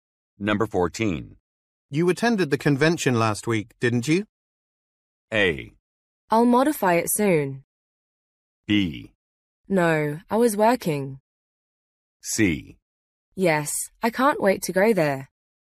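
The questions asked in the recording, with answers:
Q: You attended the convention last week, didn't you?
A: B: No, I was working.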